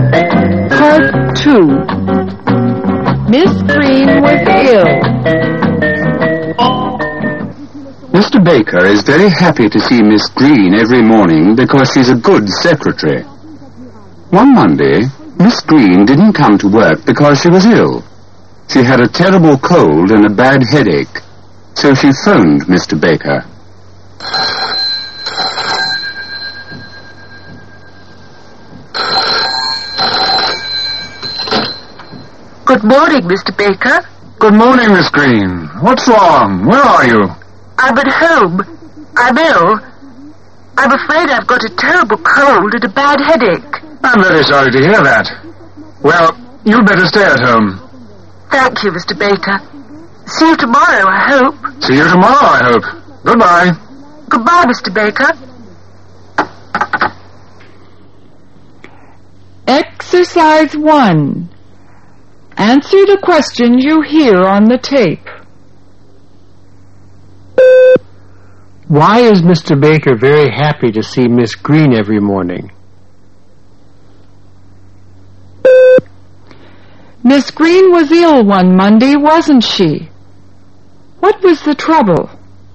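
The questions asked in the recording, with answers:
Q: Why is Mr. Baker very happy to see Miss Green every morning?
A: Because she's a good secretary.

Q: Miss Green was ill one Monday, wasn't she?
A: Yes, she was.

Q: What was the trouble?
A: She had a terrible cold and a bad headache.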